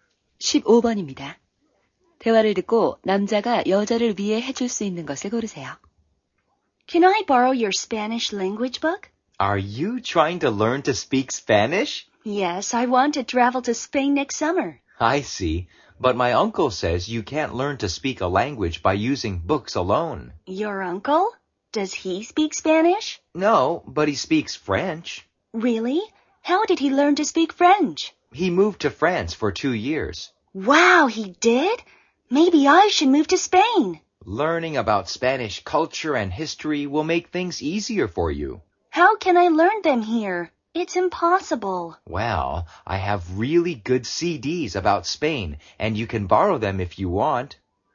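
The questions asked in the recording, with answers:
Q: 대화를 듣고 남자가 여자를 위해 해줄 수 있는 것을 고르세요.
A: 스페인에 관한 CD 빌려주기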